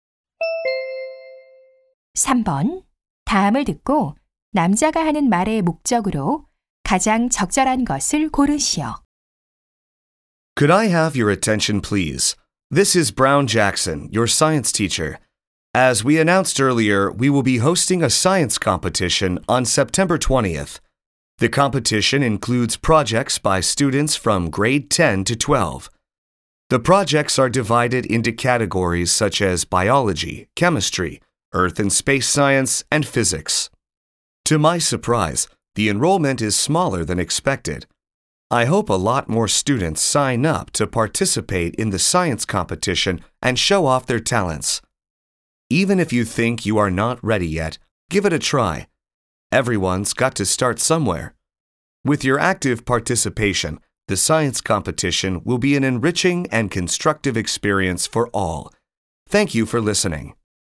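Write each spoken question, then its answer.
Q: 다음을 듣고 남자가 하는 말의 목적으로 가장 적절한 것을 고르시오.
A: 과학 경진대회 참가를 독려하려고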